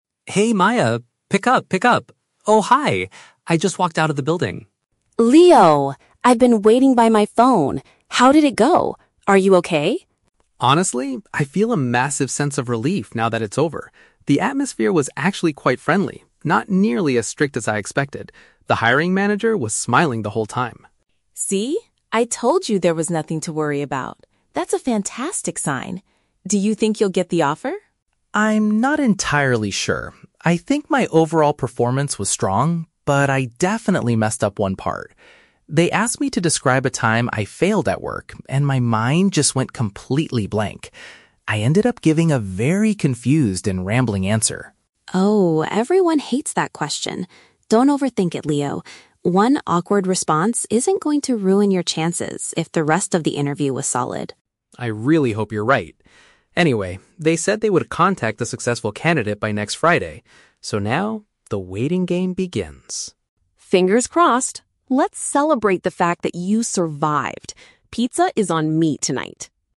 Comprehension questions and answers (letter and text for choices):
Listen to a phone conversation between a candidate and his friend. Choose the best answer (A, B, or C) for each question.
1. How did Leo feel about the general mood of the interview?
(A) It was much stricter than he had prepared for.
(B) It was extremely stressful because the manager was unhappy.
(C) It was surprisingly welcoming and relaxed.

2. What is Leo's main concern regarding his performance?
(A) He gave an unclear response to a question about his past mistakes.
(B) He forgot the name of the company's hiring manager.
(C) He spoke too quickly when talking about his professional skills.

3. When will Leo find out the final result of the interview?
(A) Later this evening during dinner.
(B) By the end of the following week.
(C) In exactly two weeks.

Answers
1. (C) It was surprisingly welcoming and relaxed.
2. (A) He gave an unclear response to a question about his past mistakes.
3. (B) By the end of the following week.

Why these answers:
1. Leo says the atmosphere was "quite friendly, not nearly as strict as I expected" and the manager was "smiling." Paraphrasing: friendly and not strict = welcoming and relaxed.
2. Leo mentions he was asked to "describe a time I failed at work" and he gave a "confused and rambling answer." Paraphrasing: failed at work = past mistakes; confused and rambling = unclear.
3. Leo states that the company will contact the successful candidate "by next Friday." Paraphrasing: by next Friday = by the end of the following week.

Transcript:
Leo: Hey Maya, pick up, pick up... Oh, hi! I just walked out of the building.
Maya: Leo! I've been waiting by my phone. How did it go? Are you okay?
Leo: Honestly, I feel a massive sense of relief now that it's over. The atmosphere was actually quite friendly, not nearly as strict as I expected. The hiring manager was smiling the whole time.
Maya: See? I told you there was nothing to worry about! That's a fantastic sign. Do you think you'll get the offer?
Leo: I'm not entirely sure. I think my overall performance was strong, but I definitely messed up one part. They asked me to describe a time I failed at work, and my mind just went completely blank. I ended up giving a very confused and rambling answer.
Maya: Oh, everyone hates that question. Don't overthink it, Leo. One awkward response isn't going to ruin your chances if the rest of the interview was solid.
Leo: I really hope you're right. Anyway, they said they would contact the successful candidate by next Friday. So now, the waiting game begins.
Maya: Fingers crossed! Let's celebrate the fact that you survived. Pizza is on me tonight!